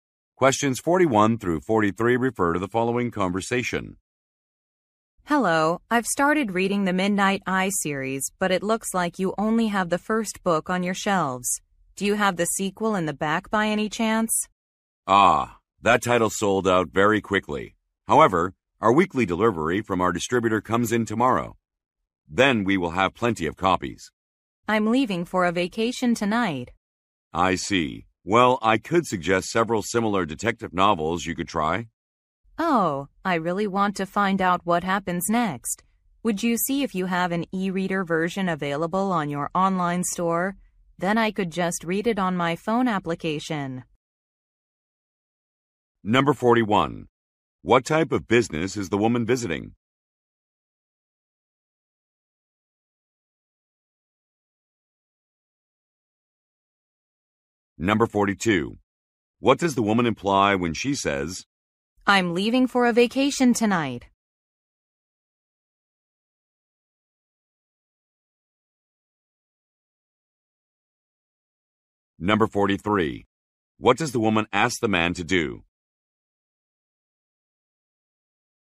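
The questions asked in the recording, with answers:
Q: What type of business is the woman visiting?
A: A bookstore

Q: What does the woman ask the man to do?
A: Check for an e-reader version on the online store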